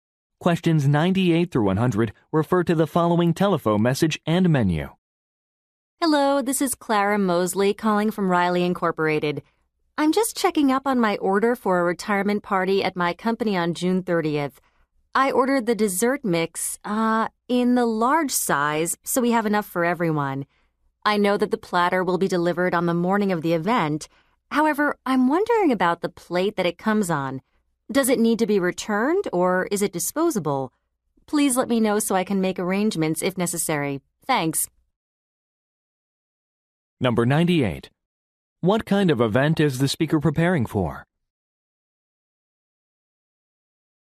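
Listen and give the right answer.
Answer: A retirement party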